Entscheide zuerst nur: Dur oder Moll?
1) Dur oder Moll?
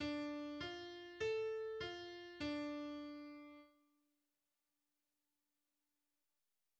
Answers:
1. d-Moll